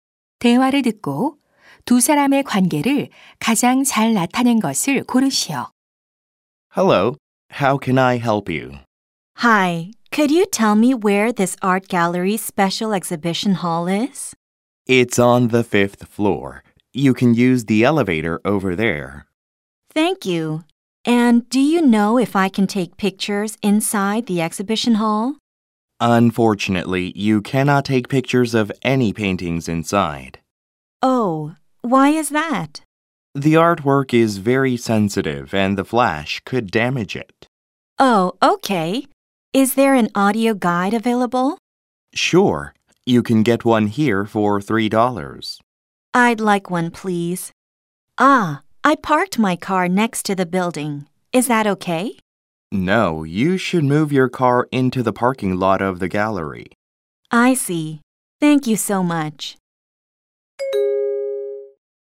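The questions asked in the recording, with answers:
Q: 대화를 듣고 두 사람의 관계를 가장 잘 나타낸 것을 고르시오.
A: 미술관 직원 - 관람객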